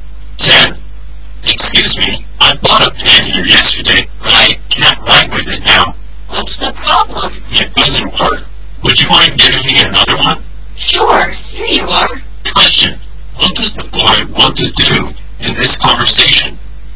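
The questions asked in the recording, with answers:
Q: Question, what does the boy want to do in this conversation?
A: Change his pen for another one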